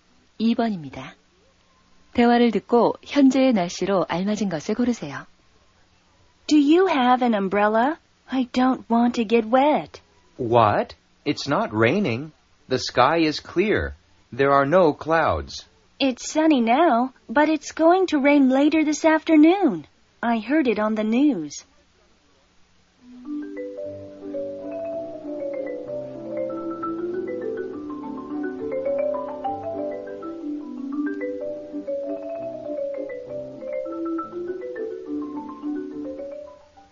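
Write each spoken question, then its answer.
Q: 대화를 듣고 현재의 날씨로 알맞은 것을 고르세요.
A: 맑음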